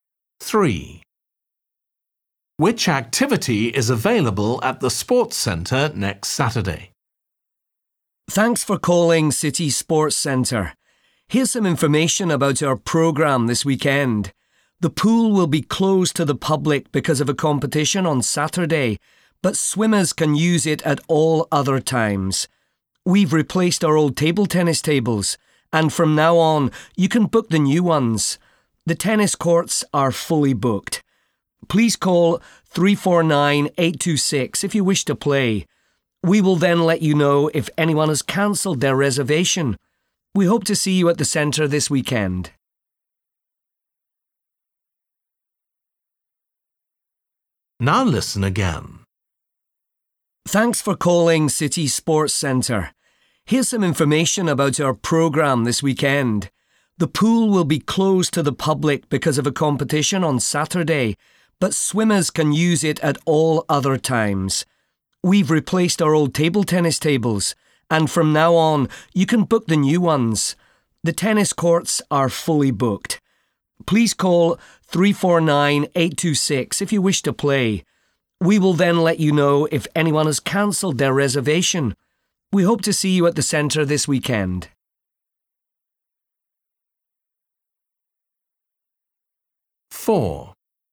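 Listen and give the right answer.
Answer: table tennis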